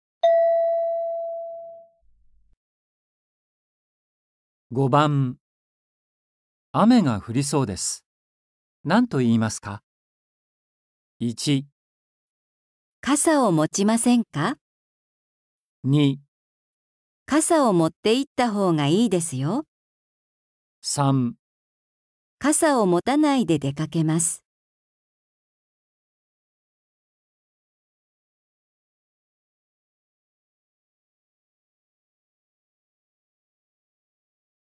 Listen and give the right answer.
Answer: 2

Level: 初級